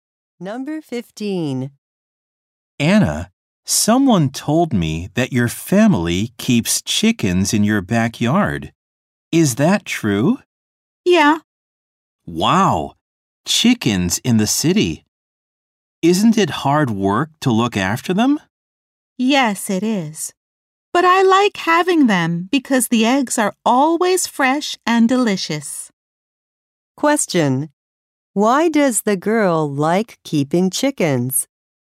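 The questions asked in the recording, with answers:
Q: Question. Why does the girl like keeping chickens?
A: The eggs are always fresh and delicious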